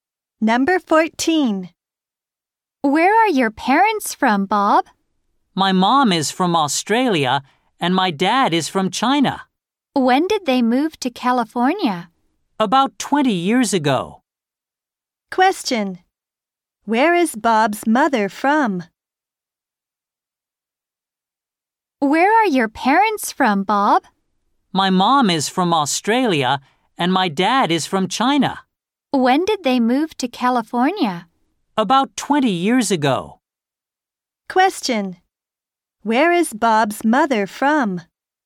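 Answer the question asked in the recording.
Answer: Australia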